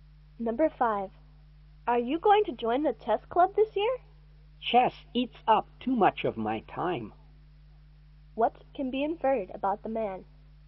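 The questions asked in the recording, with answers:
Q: What can be inferred about the man?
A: He won't join the chess club.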